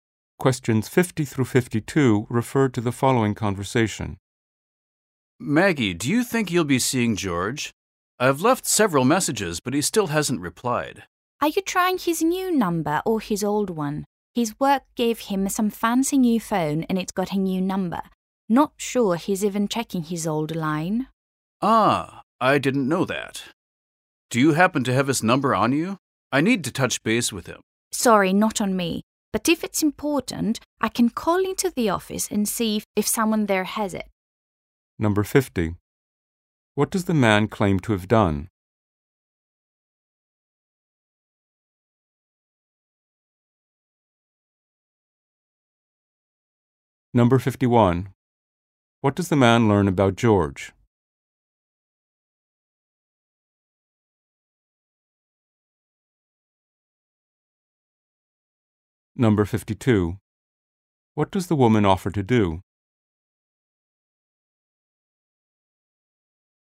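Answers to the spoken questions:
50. Left several messages for George
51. He has a new phone number from work
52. Call the office to get George's number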